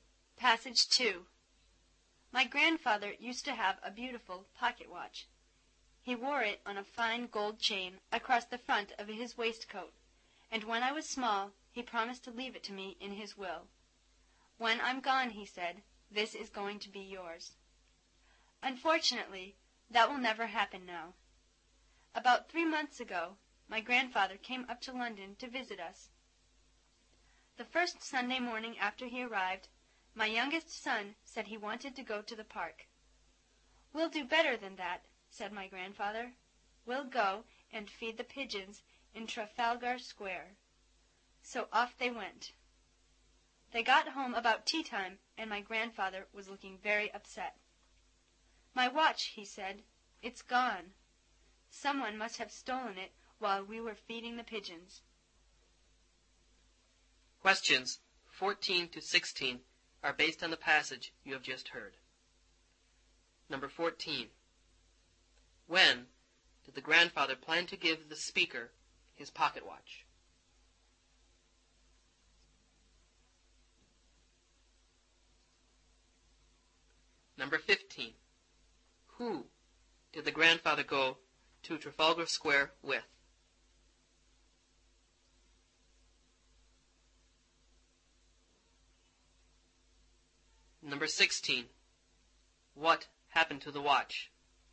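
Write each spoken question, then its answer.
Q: When did the grandfather plan to give the speaker his pocket watch?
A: After his death (in his will)

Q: Who did the grandfather go to Trafalgar Square with?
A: The speaker's youngest son

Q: What happened to the watch?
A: It was stolen while they fed the pigeons.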